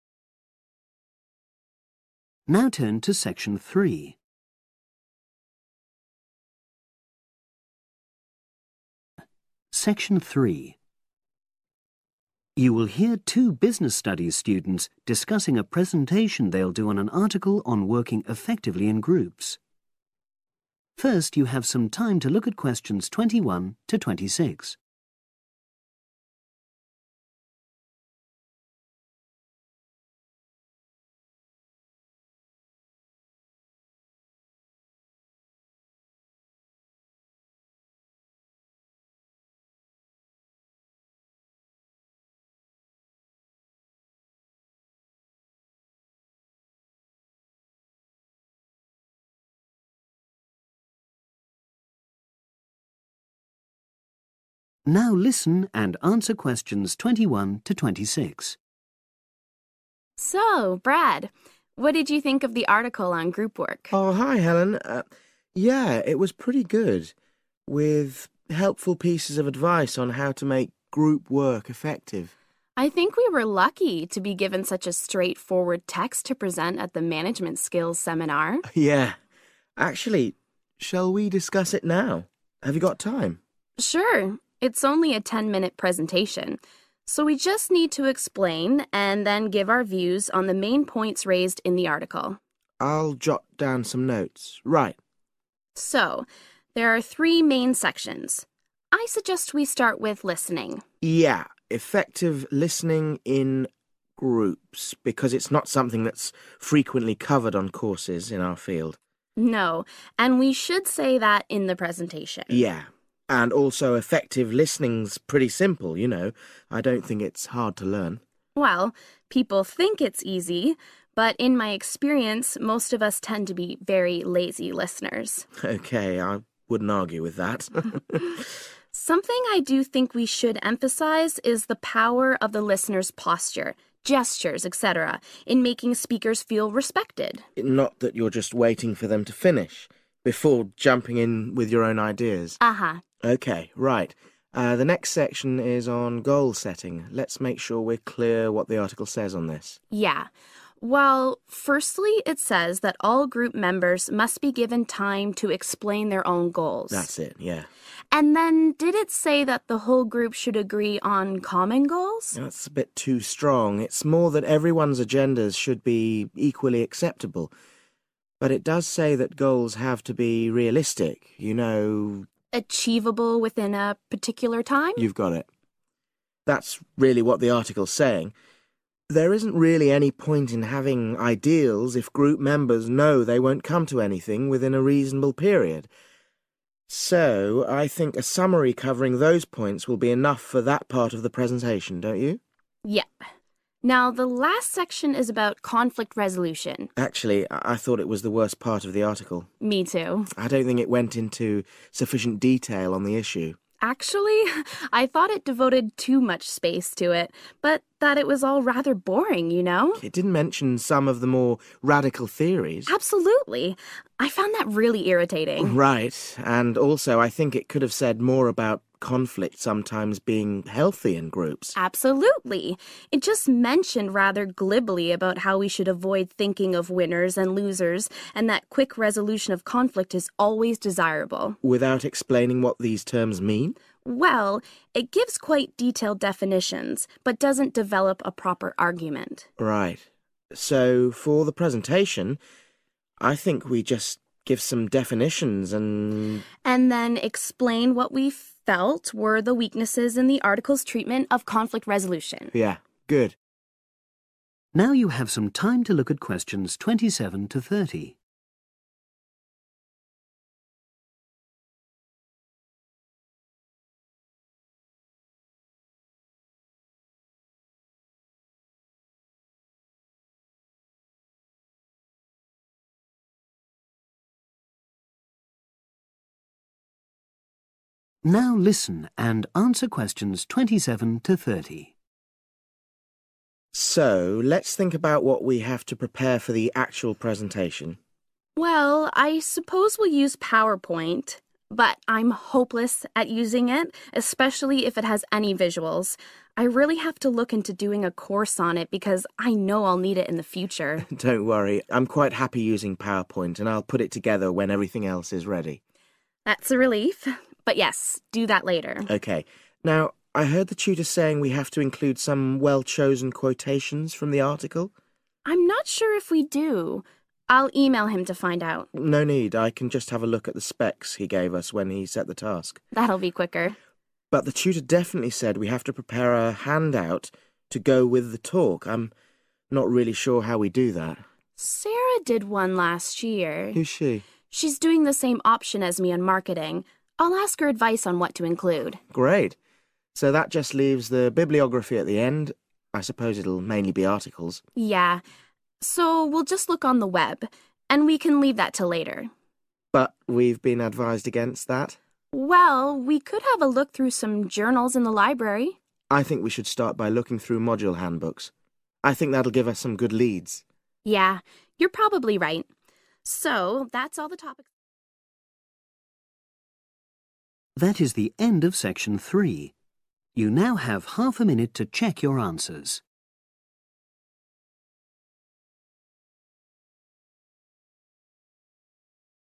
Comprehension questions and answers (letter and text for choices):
Choose TWO letters, A-E.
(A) Contact the tutor for clarification.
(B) Check the assignment specifications.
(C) Leave it until the last task.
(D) Ask a course-mate to help.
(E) Find information on the Internet.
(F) Look through course handbooks.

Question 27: Preparing the powerpoint.............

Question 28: Using direct quotations.............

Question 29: Creating a handout.............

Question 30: Drawing up a bibliography............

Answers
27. (C) Leave it until the last task.
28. (B) Check the assignment specifications.
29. (D) Ask a course-mate to help.
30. (F) Look through course handbooks.